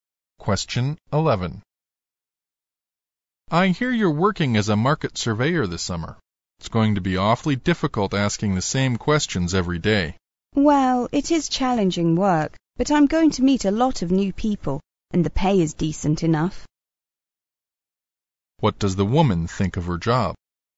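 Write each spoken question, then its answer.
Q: What does the woman think of her job?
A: It's challenging but she'll meet many new people and the pay is decent.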